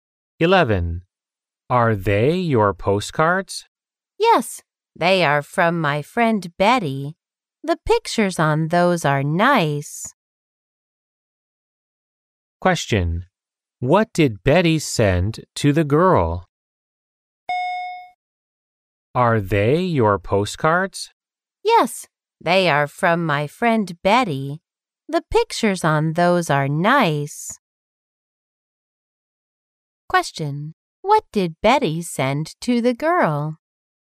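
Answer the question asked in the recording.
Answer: Postcards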